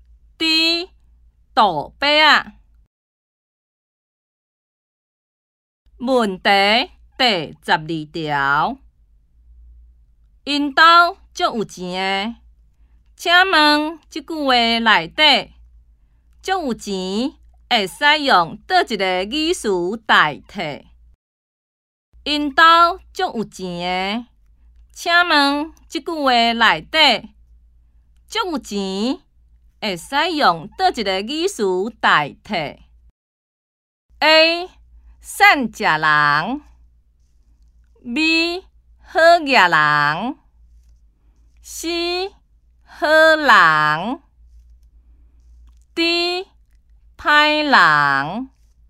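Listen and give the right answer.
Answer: B: 好野人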